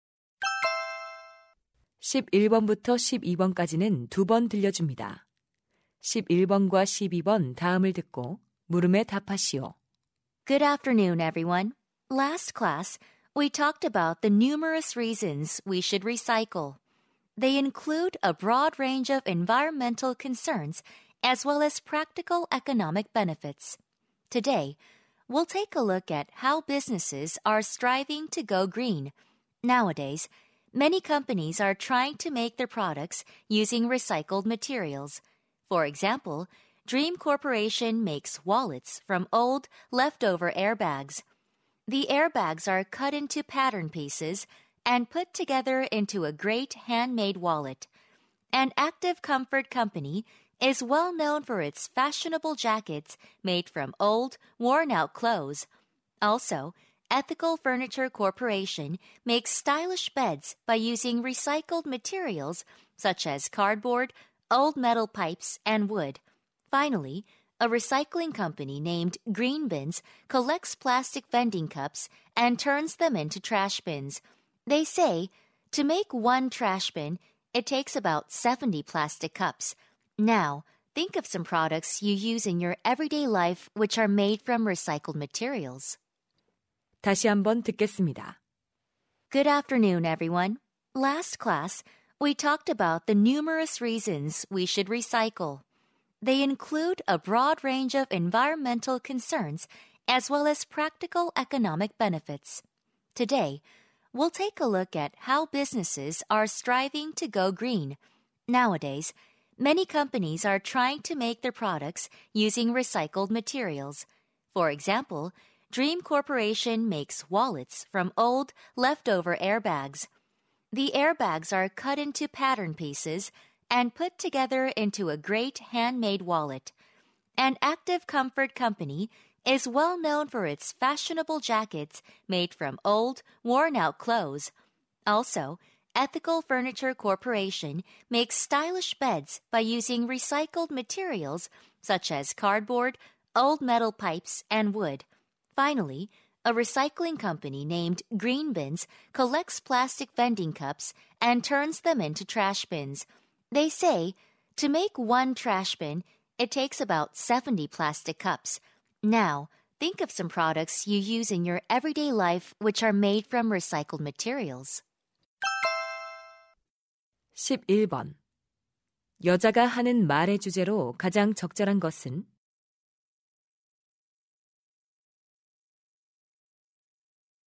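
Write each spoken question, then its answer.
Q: 여자가 하는 말의 주제로 가장 적절한 것은?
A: 재활용 소재로 제품을 만드는 기업들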